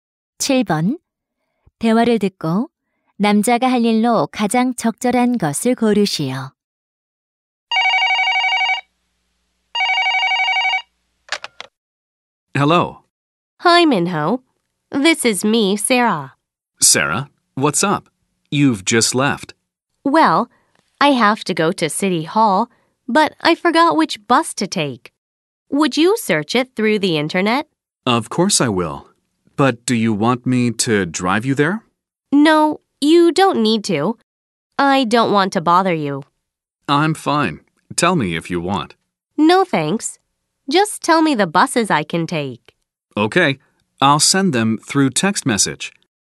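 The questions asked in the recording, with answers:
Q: 대화를 듣고 남자가 할 일로 가장 적절한 것을 고르시오.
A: 시청 가는 버스를 검색해서 문자로 보내주기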